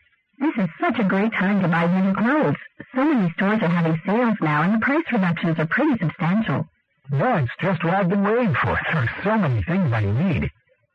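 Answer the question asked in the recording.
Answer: He is eager to buy clothes at the sales; he has been waiting for them.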